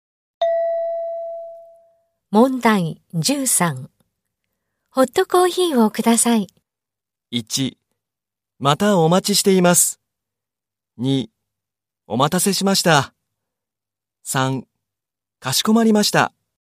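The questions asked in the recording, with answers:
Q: ホットコーヒーをください。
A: 3: かしこまりました。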